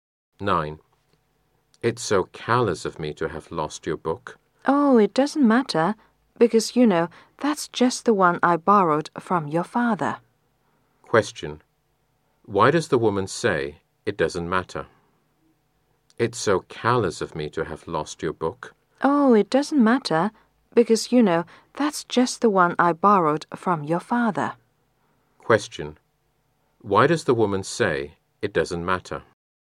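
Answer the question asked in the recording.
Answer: The book was one she borrowed from his father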